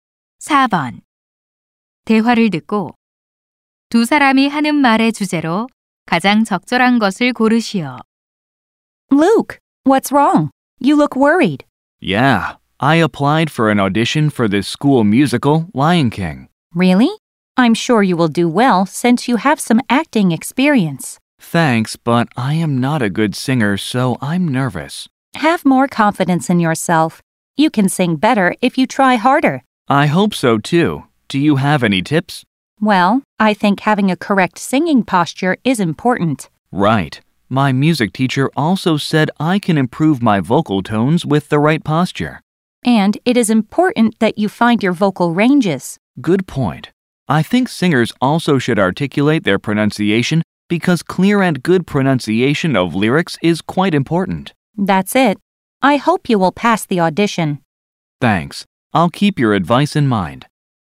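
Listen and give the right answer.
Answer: 노래를 잘 부르는 방법(오디션 준비 조언)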